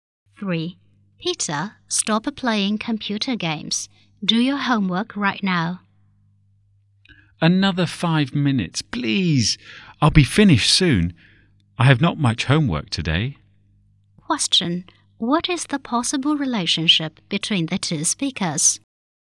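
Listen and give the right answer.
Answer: Parent and child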